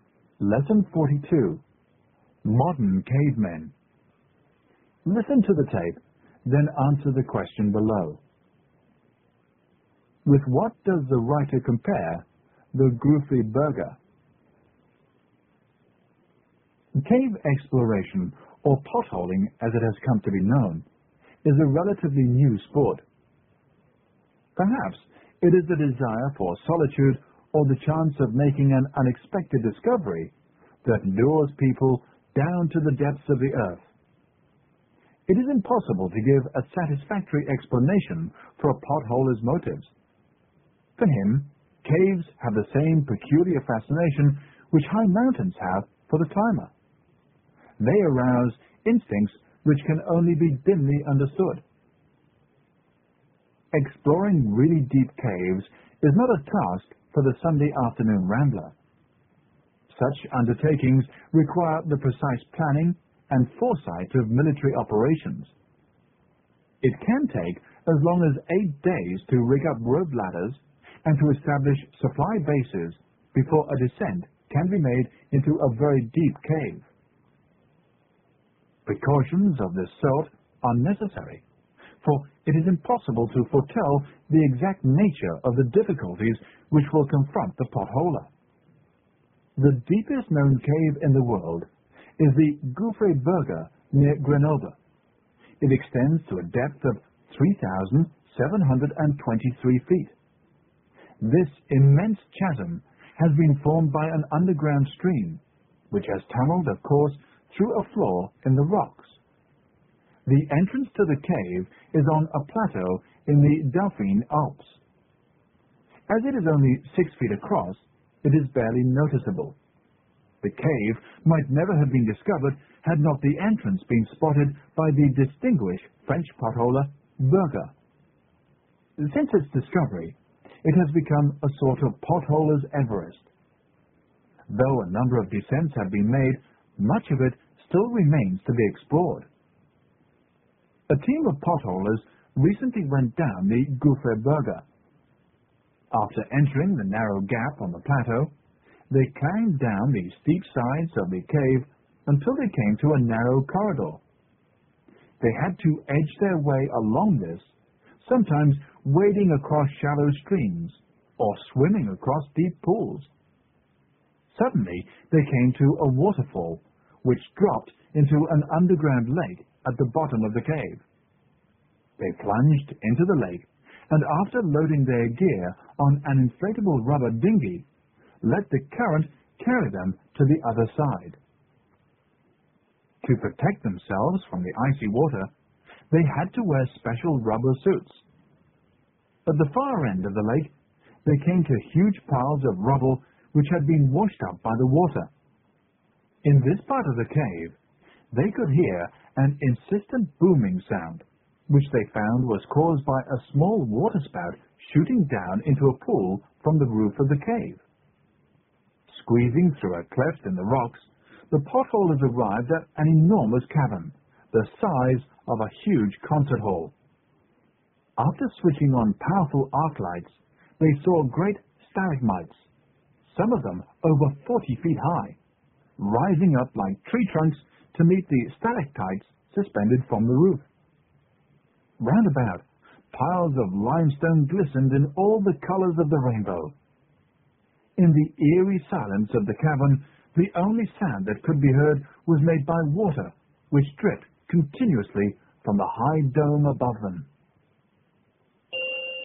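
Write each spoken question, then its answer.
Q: With what does the writer compare the Goofy Burger?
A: Everest (a sort of potholer's Everest)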